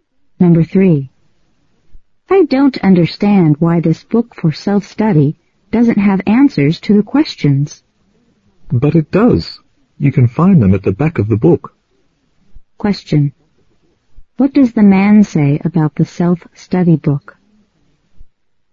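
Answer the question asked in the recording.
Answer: It has answers at the back of the book.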